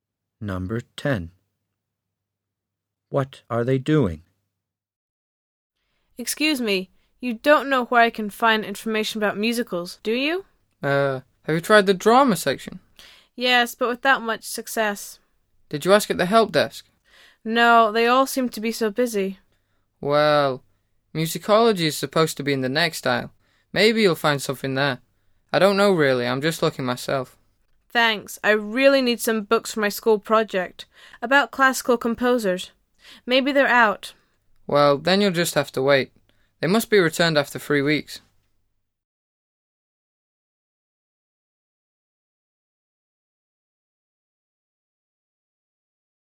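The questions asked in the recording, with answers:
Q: What are they doing?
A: Looking for books in a library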